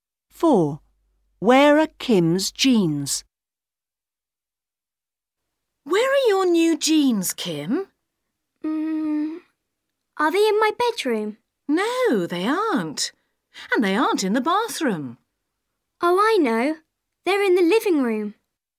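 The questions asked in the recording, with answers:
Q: Where are Kim's jeans?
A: In the living room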